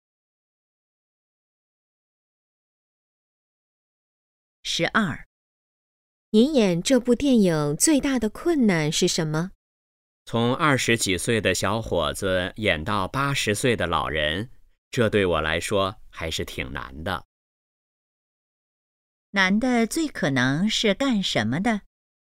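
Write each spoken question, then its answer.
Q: 难的最可能是干什么的?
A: 演员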